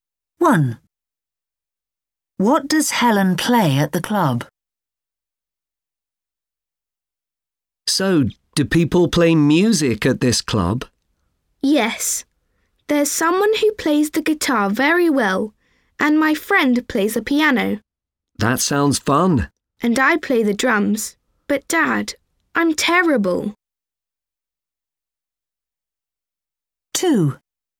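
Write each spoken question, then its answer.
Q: What does Helen play at the club?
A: the drums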